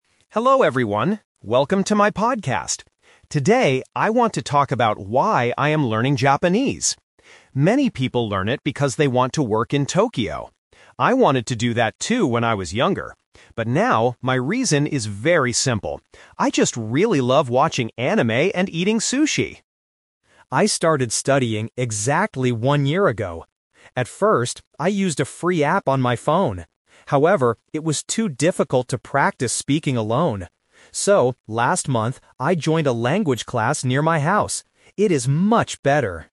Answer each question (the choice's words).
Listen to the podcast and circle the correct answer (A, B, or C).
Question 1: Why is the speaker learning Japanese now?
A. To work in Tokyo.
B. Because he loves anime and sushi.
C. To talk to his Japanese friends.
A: Because he loves anime and sushi.

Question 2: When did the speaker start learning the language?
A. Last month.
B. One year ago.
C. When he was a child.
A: One year ago.

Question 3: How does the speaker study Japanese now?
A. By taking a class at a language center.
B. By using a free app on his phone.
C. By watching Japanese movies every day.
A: By taking a class at a language center.

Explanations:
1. The speaker clearly states his current reason: "But now, my reason is very simple. I just really love watching anime and eating sushi!" Why the trap is wrong: Option (A) is the trap (The Twist). Working in Tokyo is what "many people" do, and what he wanted to do "when I was younger," but it is not his reason now. Option (C) was not mentioned.
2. The speaker says, "I started studying exactly one year ago." Why the trap is wrong: Option (A) is the trap. "Last month" is when he joined the language class, not when he started learning. Option (C) is a trap related to the phrase "when I was younger," but he didn't start learning back then.
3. He explains his current method: "So, last month, I joined a language class near my house." Why the trap is wrong: Option (B) is the trap (The Twist). Using a free app is what he did "at first," but he stopped because it was too difficult to practice speaking. Option (C) is a plausible guess related to anime, but it is not his study method.

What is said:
Podcaster: Hello everyone, welcome to my podcast! Today, I want to talk about why I am learning Japanese. Many people learn it because they want to work in Tokyo. I wanted to do that too when I was younger. But now, my reason is very simple. I just really love watching anime and eating sushi!
I started studying exactly one year ago. At first, I used a free app on my phone. However, it was too difficult to practice speaking alone. So, last month, I joined a language class near my house. It is much better!